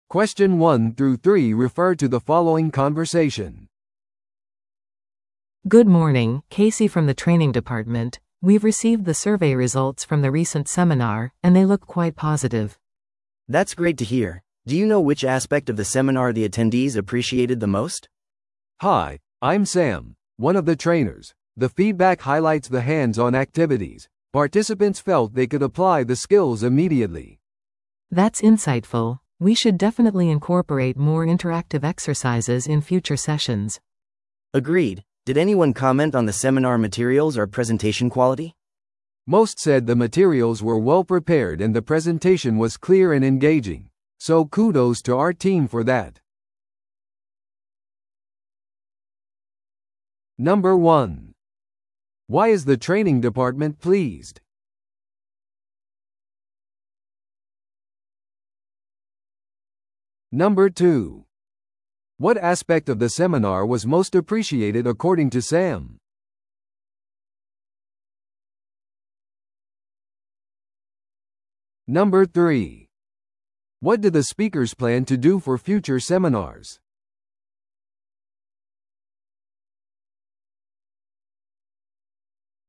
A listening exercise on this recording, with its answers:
Listen to the audio below and answer the questions.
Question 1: Why is the training department pleased?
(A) 予算が増えたから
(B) セミナーのアンケート結果が良かったから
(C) セミナーの予約が満席になったから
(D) 新しいスタッフを雇ったから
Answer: (B) セミナーのアンケート結果が良かったから

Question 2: What aspect of the seminar was most appreciated according to Sam?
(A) 会場のロケーション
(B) 実践的なアクティビティ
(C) 割引料金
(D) 複数のスピーカー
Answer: (B) 実践的なアクティビティ

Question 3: What do the speakers plan to do for future seminars?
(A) トレーナーを増やす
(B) 参加者の数を減らす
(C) セミナーの期間を延長する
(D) よりインタラクティブなエクササイズを取り入れる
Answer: (D) よりインタラクティブなエクササイズを取り入れる

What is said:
A: Good morning, Casey from the training department. We've received the survey results from the recent seminar, and they look quite positive.
B: That's great to hear. Do you know which aspect of the seminar the attendees appreciated the most?
C: Hi, I'm Sam, one of the trainers. The feedback highlights the hands-on activities. Participants felt they could apply the skills immediately.
A: That's insightful! We should definitely incorporate more interactive exercises in future sessions.
B: Agreed. Did anyone comment on the seminar materials or presentation quality?
C: Most said the materials were well-prepared and the presentation was clear and engaging, so kudos to our team for that.

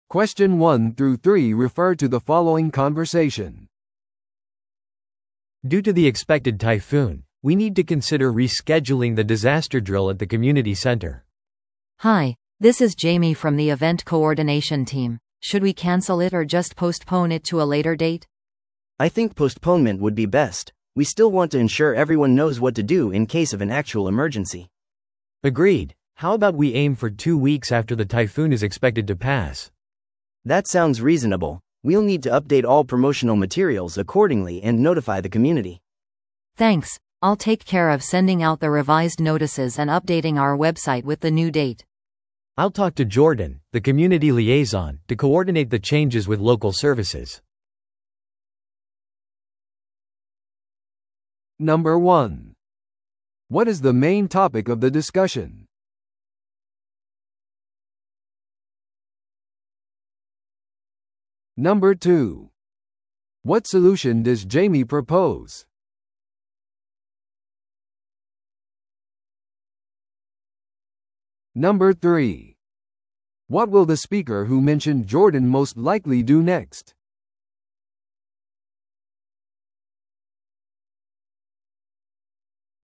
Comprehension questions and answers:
Listen to the audio below and answer the questions.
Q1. What is the main topic of the discussion?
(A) 台風のために防災訓練を中止すること。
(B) コミュニティセンターの訓練の新しい日付を選ぶこと。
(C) 訓練の日程変更と宣伝資料の更新。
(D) コミュニティと緊急時の手順を話し合うこと。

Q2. What solution does Jamie propose?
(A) 訓練を屋内で実施する。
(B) 訓練を後の日程に延期する。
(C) 台風にも関わらず予定通り訓練を行う。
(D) 再スケジュールされた訓練のために追加のスタッフを雇う。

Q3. What will the speaker who mentioned Jordan most likely do next?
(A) 日程再調整のためコミュニティ連絡員に連絡を取る。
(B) コミュニティに気象警報を送る。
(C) コミュニティセンターの他のイベントの日程を調整する。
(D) コミュニティセンターを台風に備えて準備する。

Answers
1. (C) 訓練の日程変更と宣伝資料の更新。
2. (B) 訓練を後の日程に延期する。
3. (A) 日程再調整のためコミュニティ連絡員に連絡を取る。

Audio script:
A: Due to the expected typhoon, we need to consider rescheduling the disaster drill at the community center.
B: Hi, this is Jamie from the event coordination team. Should we cancel it or just postpone it to a later date?
C: I think postponement would be best. We still want to ensure everyone knows what to do in case of an actual emergency.
A: Agreed. How about we aim for two weeks after the typhoon is expected to pass?
C: That sounds reasonable. We'll need to update all promotional materials accordingly and notify the community.
B: Thanks, I'll take care of sending out the revised notices and updating our website with the new date.
A: I'll talk to Jordan, the community liaison, to coordinate the changes with local services.

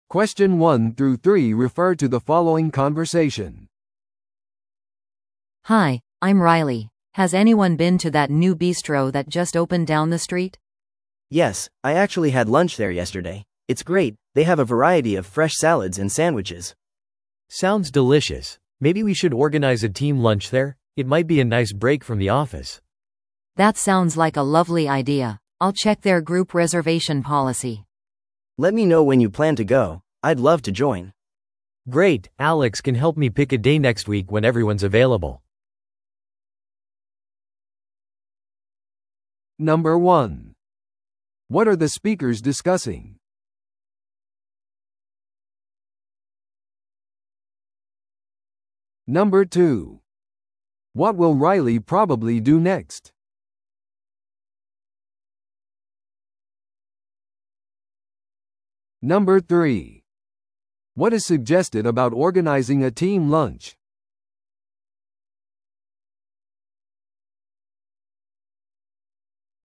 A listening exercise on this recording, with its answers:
Listen to the audio below and answer the questions.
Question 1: What are the speakers discussing?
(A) 新しいビストロの開店。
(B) ビストロへのグループ訪問の手配。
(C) オフィスでのランチメニュー変更。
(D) 地元のサンドイッチ屋の食べ物の種類。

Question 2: What will Riley probably do next?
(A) 一人でビストロでランチをとる。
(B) グループのためのビストロの予約ポリシーについて問い合わせる。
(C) 予約をせずにチームランチに参加する。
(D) チームランチの日を選ぶ。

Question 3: What is suggested about organizing a team lunch?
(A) それは後日に延期されました。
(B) チームは空き状況についての確認を待っています。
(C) チームは新しいランチメニューを試してみるべきです。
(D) それは仕事の環境からの良い休憩になるかもしれません。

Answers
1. (B) ビストロへのグループ訪問の手配。
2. (B) グループのためのビストロの予約ポリシーについて問い合わせる。
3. (D) それは仕事の環境からの良い休憩になるかもしれません。

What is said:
B: Hi, I'm Riley. Has anyone been to that new bistro that just opened down the street?
C: Yes, I actually had lunch there yesterday. It's great, they have a variety of fresh salads and sandwiches.
A: Sounds delicious. Maybe we should organize a team lunch there? It might be a nice break from the office.
B: That sounds like a lovely idea. I'll check their group reservation policy.
C: Let me know when you plan to go, I'd love to join!
A: Great, Alex can help me pick a day next week when everyone's available.

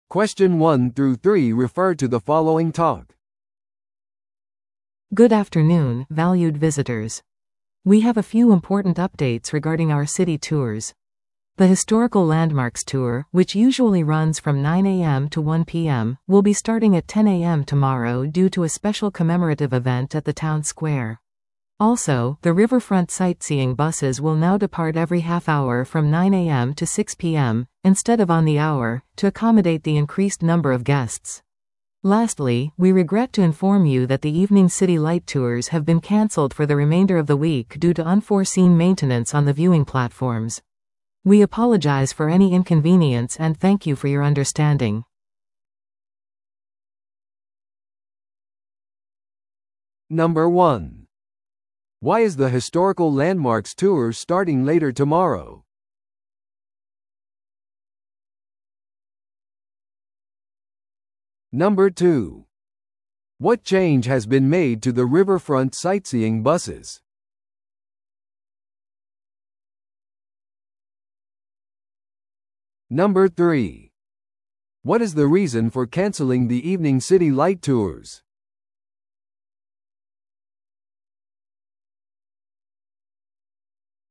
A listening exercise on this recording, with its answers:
Listen to the audio below and answer the questions.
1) Why is the historical landmarks tour starting later tomorrow?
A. お土産店で特別セールがあるため。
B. ツアーガイドが朝利用できないため。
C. 町の広場での特別記念イベントのため。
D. 天気予報が雨を予測しているため。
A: C. 町の広場での特別記念イベントのため。

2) What change has been made to the riverfront sightseeing buses?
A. 15分ごとに出発するようになりました。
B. 30分ごとに出発するようになりました。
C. バスは夕方のみ運行されます。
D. 観光ルートが延長されました。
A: B. 30分ごとに出発するようになりました。

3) What is the reason for canceling the evening city light tours?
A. 観光客の関心が少ないため。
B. ツアーバスが整備中のためです。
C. 今週は市のライトが消されています。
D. 展望台の予期せぬメンテナンスのため。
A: D. 展望台の予期せぬメンテナンスのため。

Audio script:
Good afternoon, valued visitors. We have a few important updates regarding our city tours. The historical landmarks tour, which usually runs from 9am to 1pm, will be starting at 10am tomorrow due to a special commemorative event at the town square. Also, the riverfront sightseeing buses will now depart every half hour from 9am to 6pm, instead of on the hour, to accommodate the increased number of guests. Lastly, we regret to inform you that the evening city light tours have been canceled for the remainder of the week due to unforeseen maintenance on the viewing platforms. We apologize for any inconvenience and thank you for your understanding.

